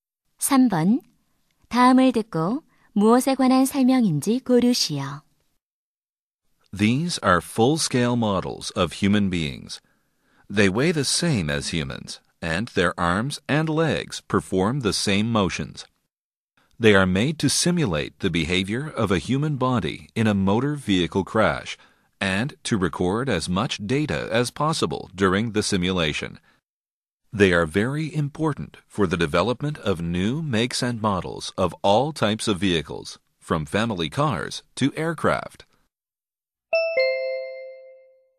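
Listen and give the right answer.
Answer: 충돌 실험용 인체 모형(더미)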